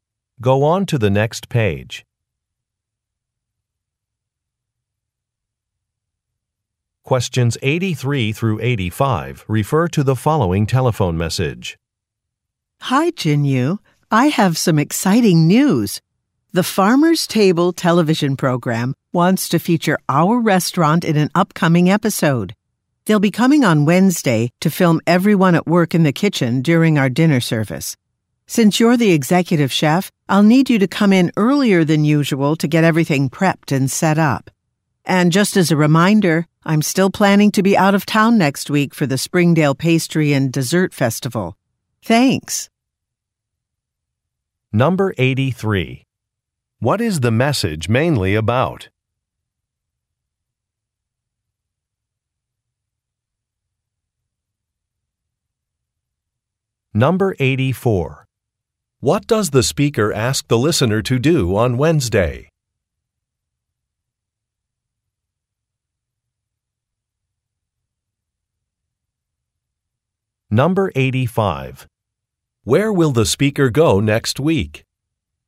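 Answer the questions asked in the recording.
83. A TV program filming the restaurant
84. Come in earlier than usual
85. A pastry and dessert festival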